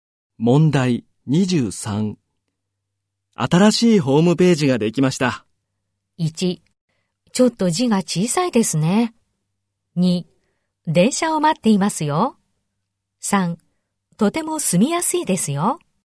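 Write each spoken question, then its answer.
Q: 新しいホームページができました。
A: 1: ちょっと字が小さいですね。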